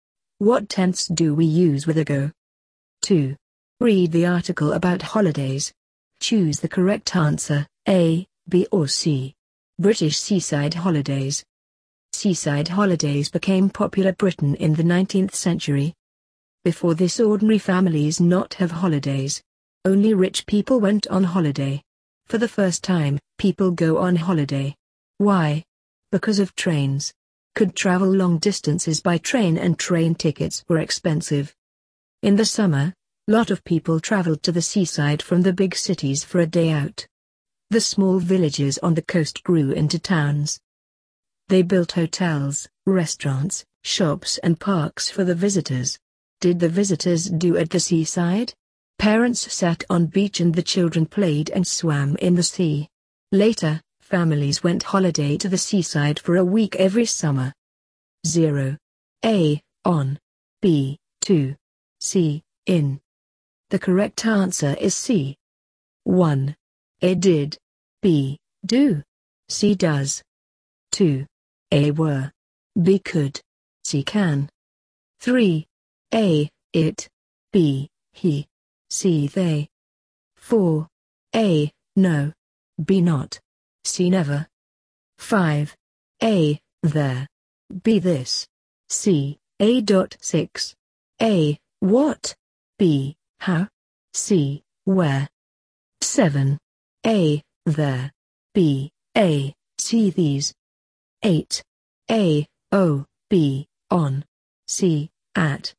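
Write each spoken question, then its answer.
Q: 1. A. Did. B. Do. C. Does.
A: A: Did

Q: 2. A. Were. B. Could. C. Can.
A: B: Could

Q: 3. A. It. B. He. C. They.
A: C: They

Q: 4. A. No. B. Not. C. Never.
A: B: Not

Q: 5. A. There. B. This. C. A.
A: C: A

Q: 6. A. What. B. How. C. Where.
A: A: What

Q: 8. A. O. B. On. C. At.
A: B: On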